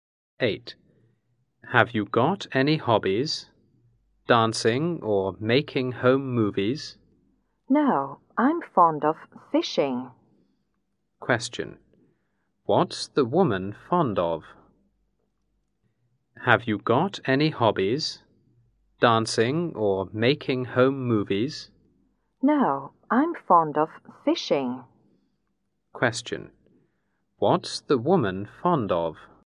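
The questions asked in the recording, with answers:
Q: What's the woman fond of?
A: Fishing.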